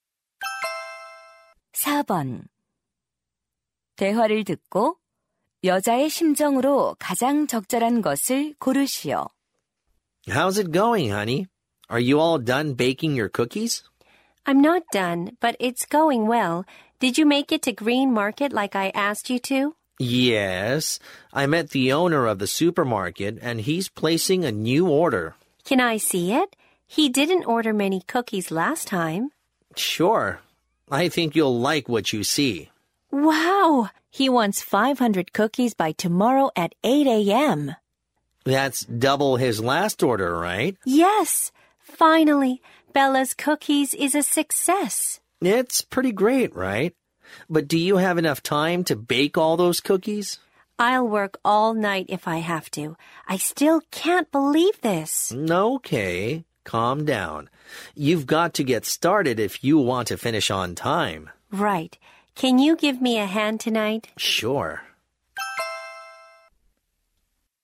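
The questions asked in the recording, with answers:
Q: 대화를 듣고 여자의 심정으로 가장 적절한 것을 고르시오.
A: 기쁘고 신난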